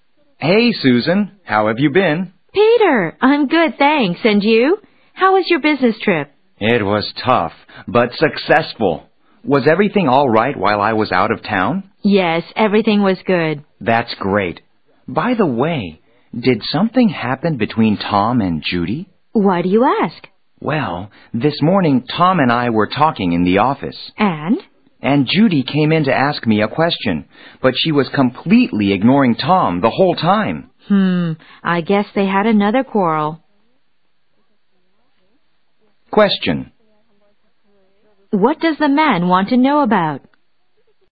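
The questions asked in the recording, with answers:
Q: What does the man want to know about?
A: Whether something happened between Tom and Judy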